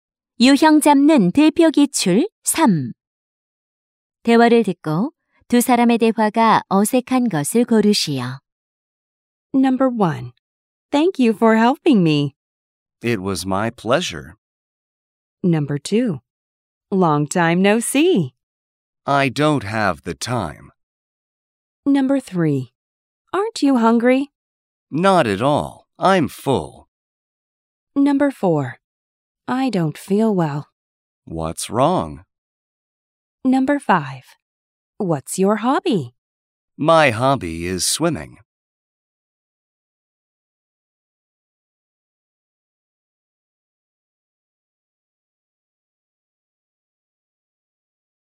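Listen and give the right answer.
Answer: 2: Long time no see. / I don't have the time.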